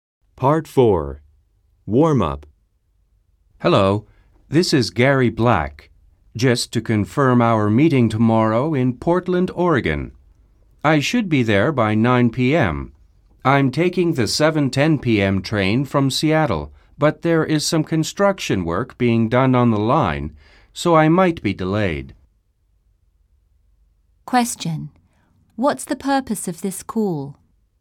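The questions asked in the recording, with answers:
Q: What's the purpose of this call?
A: To confirm tomorrow's meeting in Portland and warn he might be delayed.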